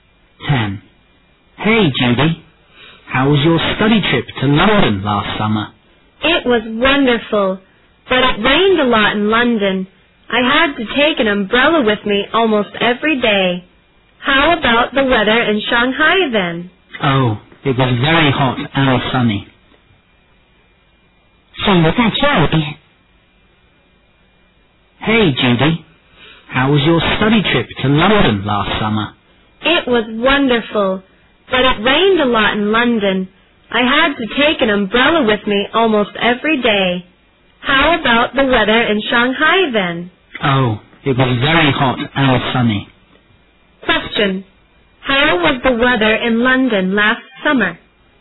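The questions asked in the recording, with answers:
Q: How was the weather in London last summer?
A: Rainy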